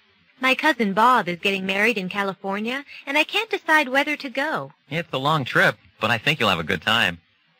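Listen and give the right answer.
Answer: The woman should go to the wedding; she'll enjoy it despite the long trip.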